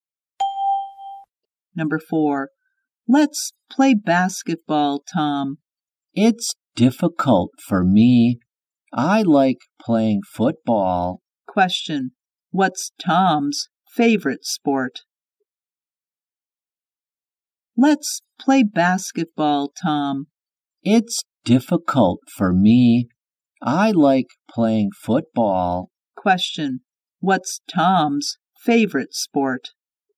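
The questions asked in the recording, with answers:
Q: What's Tom's favorite sport?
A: Football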